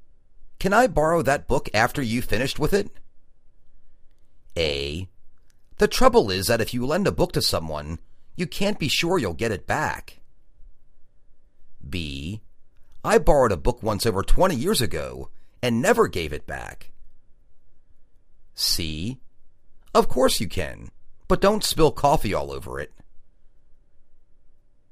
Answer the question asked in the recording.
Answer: Of course you can but don't spill coffee all over it.